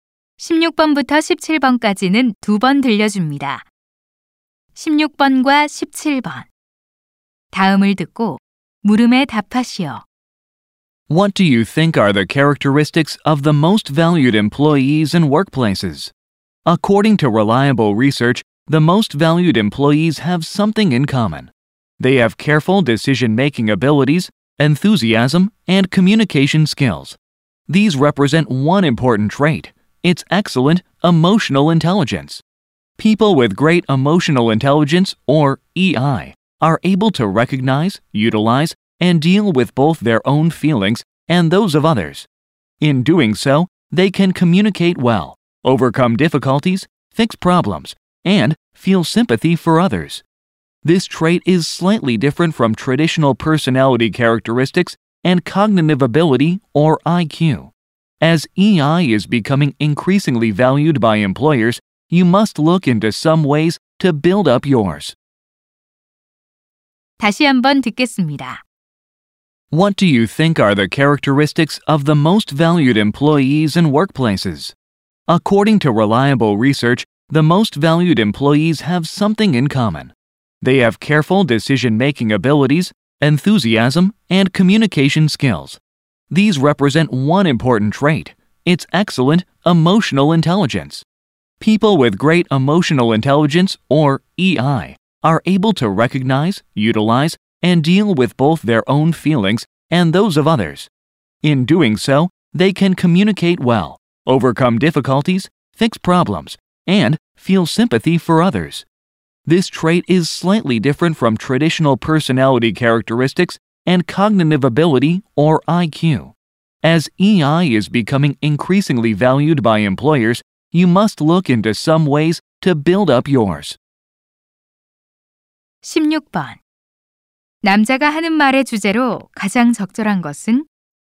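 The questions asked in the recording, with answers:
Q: 남자가 하는 말의 주제로 가장 적절한 것은?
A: 직장에서 감성 지능의 중요성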